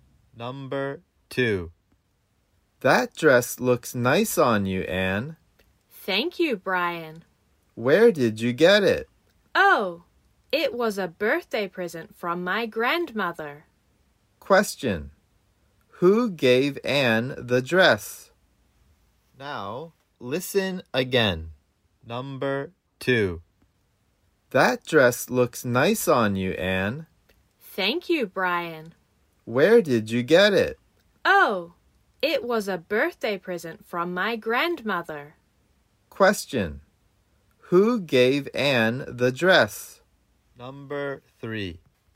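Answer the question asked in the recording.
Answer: Her grandmother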